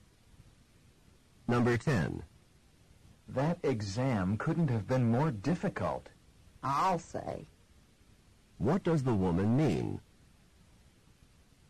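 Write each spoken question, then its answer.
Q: What does the woman mean?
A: She agrees the exam was very difficult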